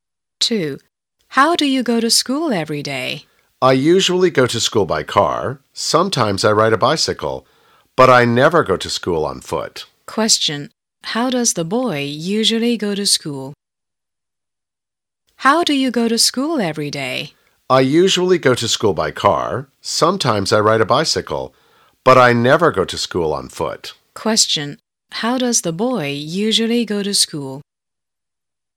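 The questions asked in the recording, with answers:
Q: How does the boy usually go to school?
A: By car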